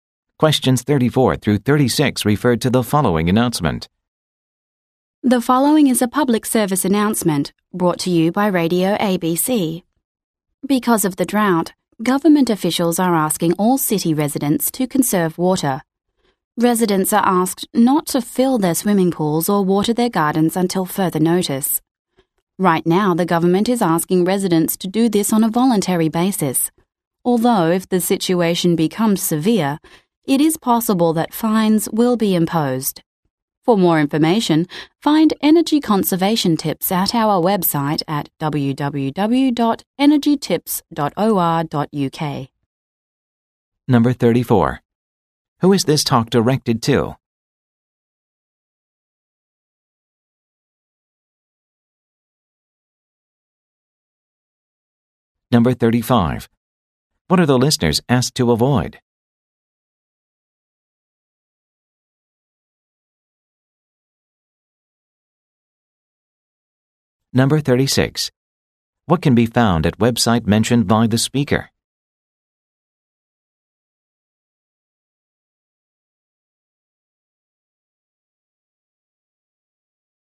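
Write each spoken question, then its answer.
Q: Who is this talk directed to?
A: City residents

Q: What are the listeners asked to avoid?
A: Filling swimming pools and watering gardens

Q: What can be found at website mentioned by the speaker?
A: Energy conservation tips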